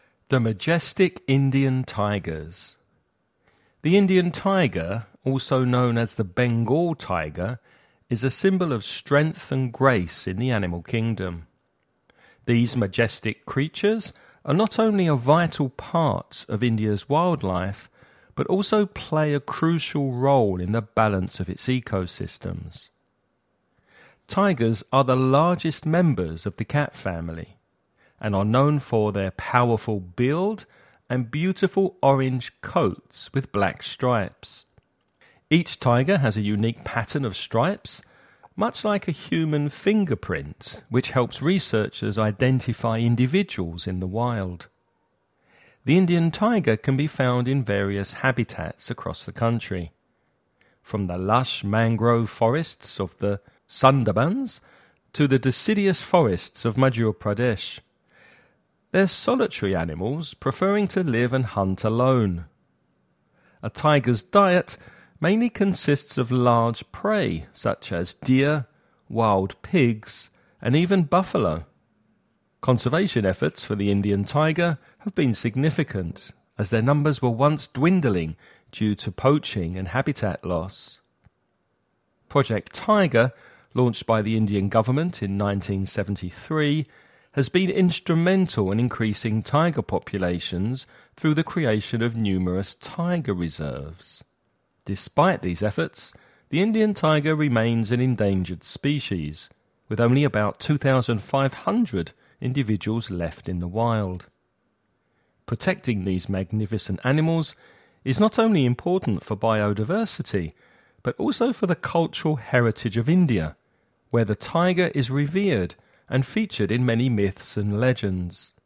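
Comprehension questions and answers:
You're going to listen to a man talking about the Indian tiger. Before you listen, read the following questions.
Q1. What is another name for the Indian tiger?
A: The Bengal tiger

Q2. Describe the appearance of the Indian tiger.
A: Powerful build, orange coat with black stripes in a unique pattern

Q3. Where can Indian tigers be found?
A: In various habitats, from the mangrove forests of the Sundarbans to the deciduous forests of Madhya Pradesh

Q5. What is the main diet of an Indian tiger?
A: Large prey such as deer, wild pigs and buffalo

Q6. Why is the Indian tiger considered an endangered species?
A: Only about 2,500 are left in the wild, due to poaching and habitat loss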